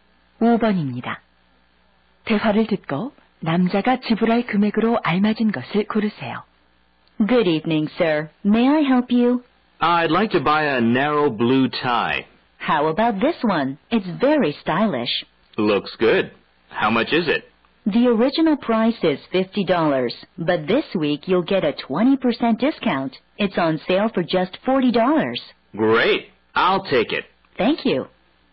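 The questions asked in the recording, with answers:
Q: 대화를 듣고 남자가 지불할 금액으로 알맞은 것을 고르세요.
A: 40달러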